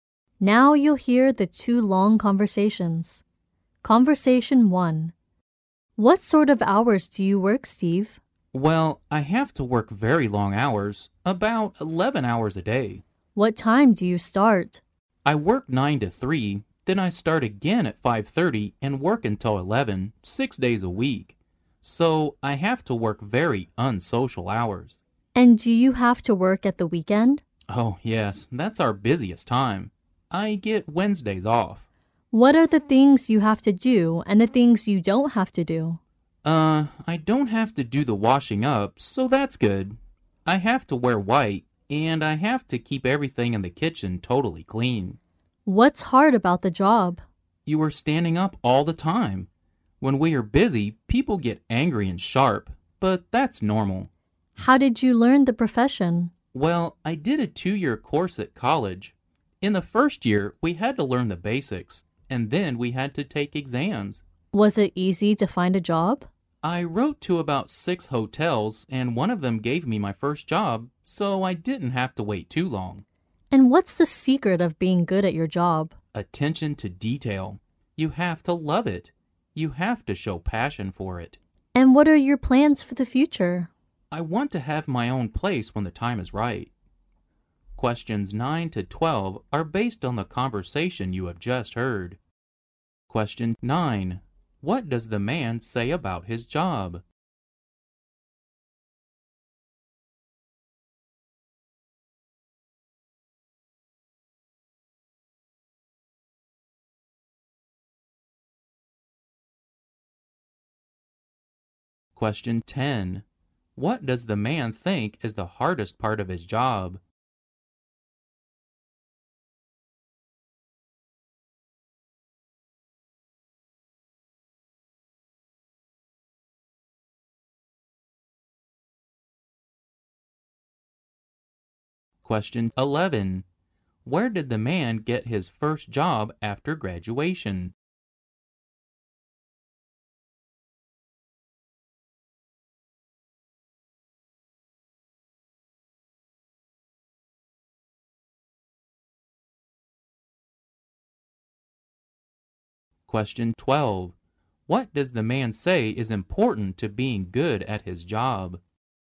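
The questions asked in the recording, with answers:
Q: What does the man think is the hardest part of his job?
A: Standing up all the time.

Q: Where did the man get his first job after graduation?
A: In a hotel.

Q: What does the man say is important to being good at his job?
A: Attention to detail and passion for the job.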